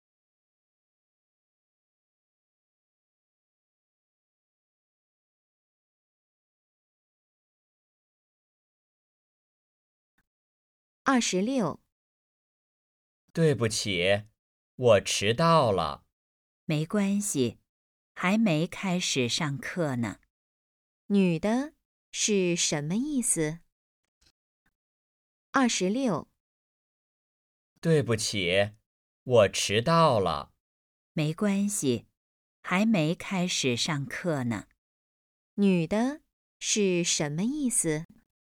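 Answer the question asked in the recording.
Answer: 没关系,还没开始上课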